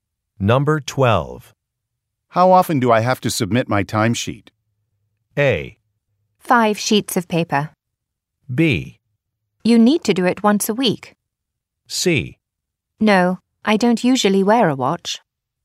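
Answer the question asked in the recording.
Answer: B: You need to do it once a week.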